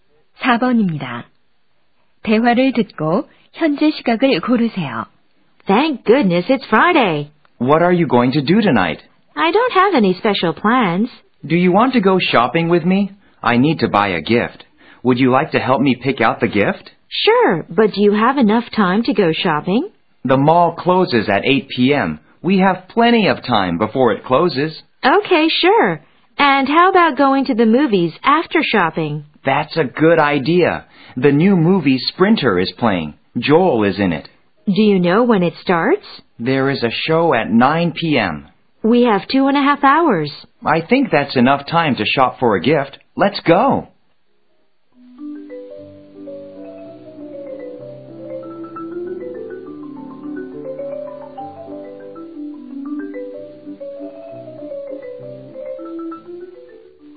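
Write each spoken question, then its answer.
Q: 대화를 듣고 현재 시각을 고르세요.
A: 오후 6시 30분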